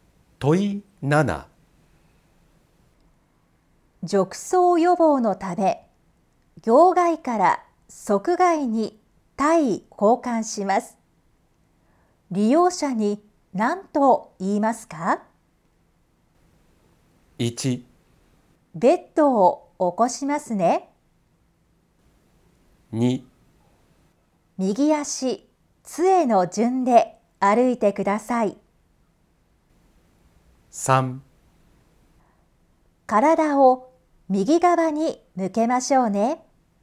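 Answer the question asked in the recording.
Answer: 3: 体を右側に向けましょうね。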